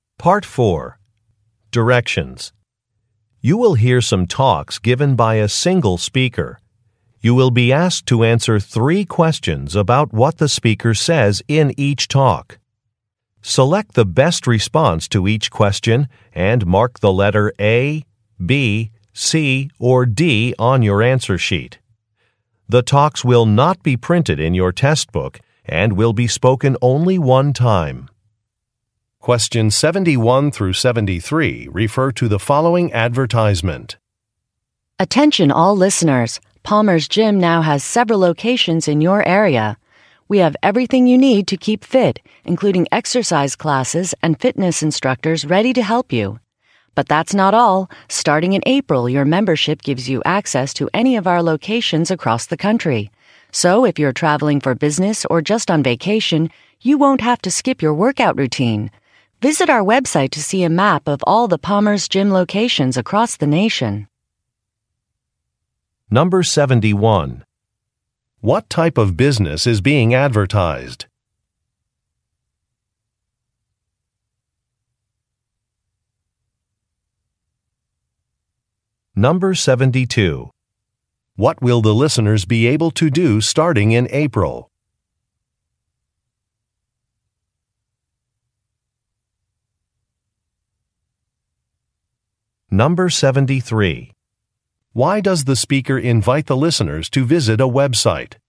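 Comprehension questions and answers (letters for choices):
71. What type of business is being advertised?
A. A farmers market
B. A fitness center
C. A medical clinic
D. A sporting goods store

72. What will the listeners be able to do starting in April?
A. Use multiple locations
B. Try free samples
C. Meet with a nutritionist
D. Enter a contest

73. Why does the speaker invite the listeners to visit a Web site?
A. To write a review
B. To register for a class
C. To check a policy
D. To look at a map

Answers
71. B
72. A
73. D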